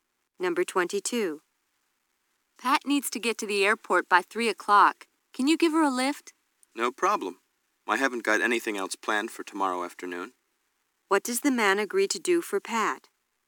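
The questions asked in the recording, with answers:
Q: What does the man agree to do for Pat?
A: Drive her to the airport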